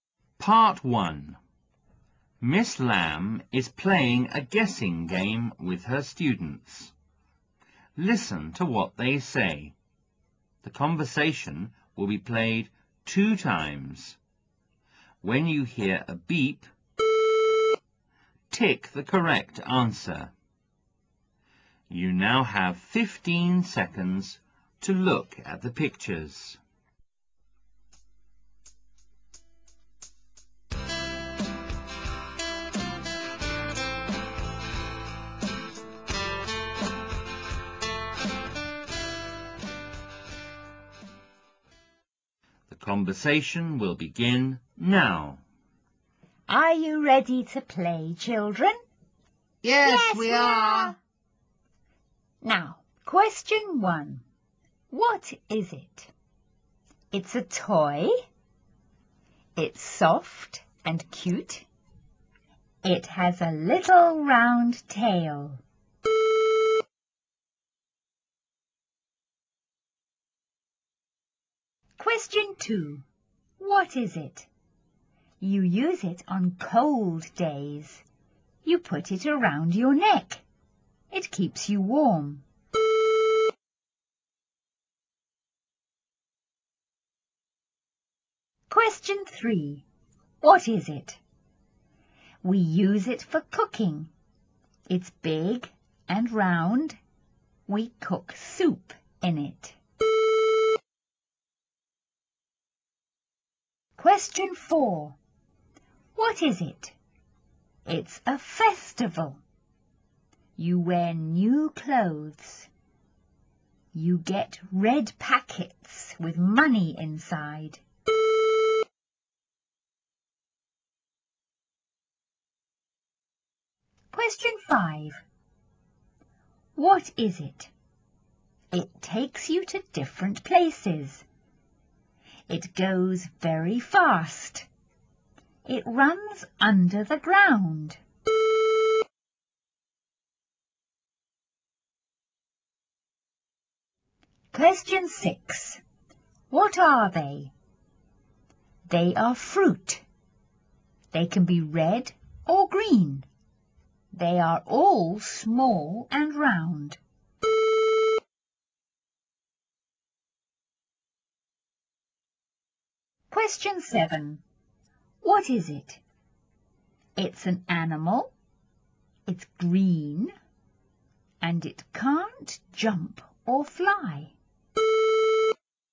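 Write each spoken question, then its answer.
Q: What is it? You use it on cold days.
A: a scarf

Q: What is it? We use it for cooking.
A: a pot

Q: What is it? It's a festival.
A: Chinese New Year

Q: What is it? It takes you to different places.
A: an underground train (MTR)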